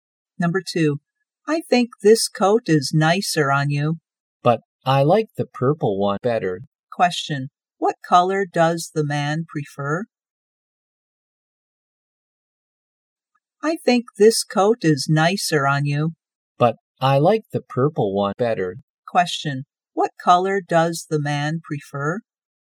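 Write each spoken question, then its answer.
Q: Question, what color does the man prefer?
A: Purple.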